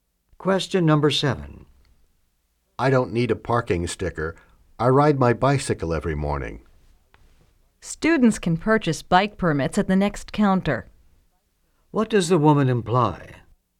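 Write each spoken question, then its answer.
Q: What does the woman imply?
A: He needs a bike permit, sold at the next counter.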